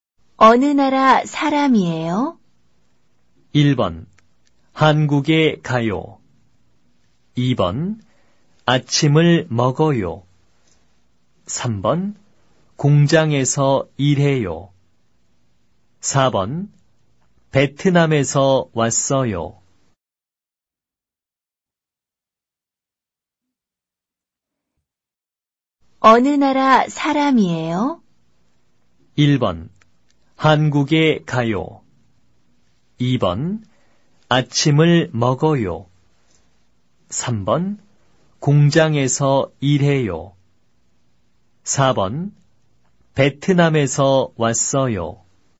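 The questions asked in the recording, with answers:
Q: 어느 나라 사람이에요?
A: 4: 베트남에서 왔어요.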